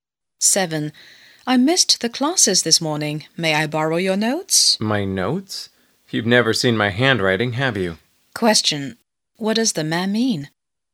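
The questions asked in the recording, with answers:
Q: What does the man mean?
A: His handwriting is hard to read, so his notes won't help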